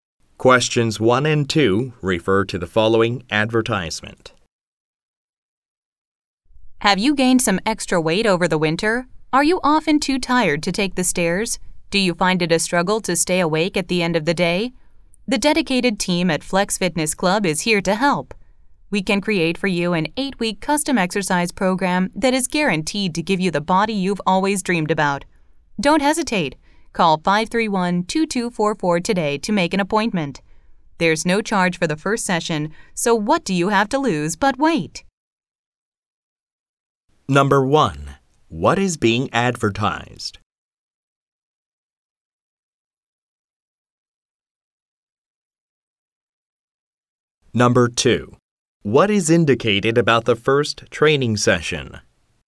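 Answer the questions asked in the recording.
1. A fitness club's custom exercise program
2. It is free of charge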